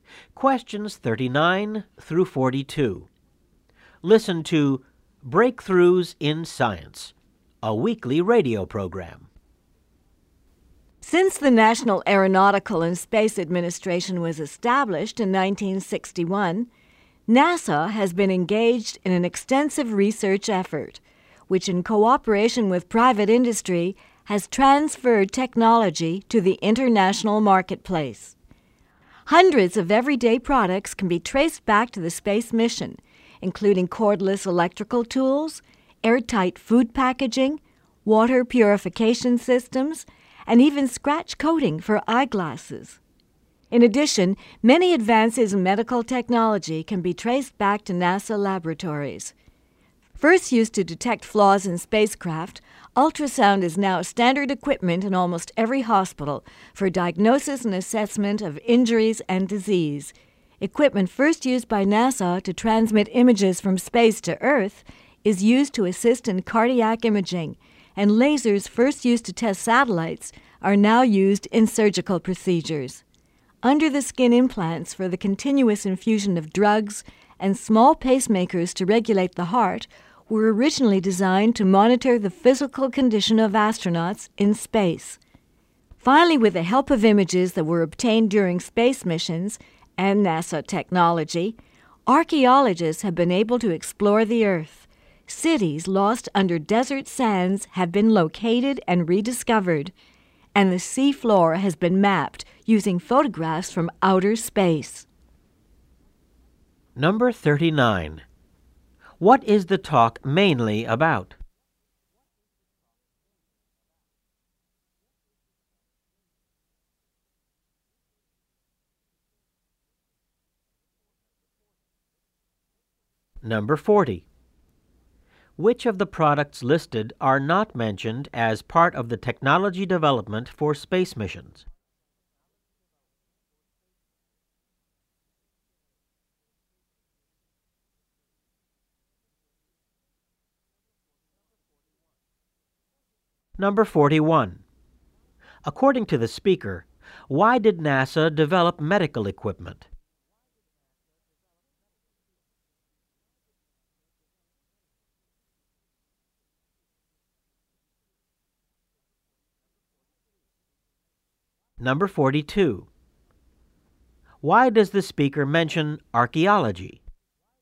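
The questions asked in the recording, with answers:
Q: What is the talk mainly about?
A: Everyday and medical products developed from NASA space technology

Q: According to the speaker, why did NASA develop medical equipment?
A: To monitor the physical condition of astronauts in space

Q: Why does the speaker mention archaeology?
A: Space images and NASA technology helped archaeologists explore the Earth and find lost cities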